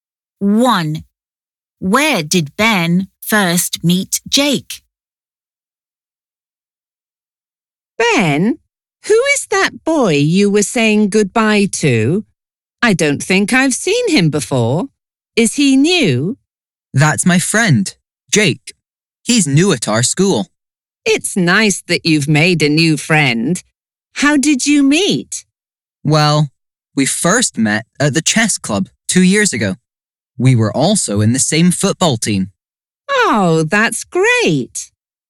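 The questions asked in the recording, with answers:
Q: Where did Ben first meet Jake?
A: At the chess club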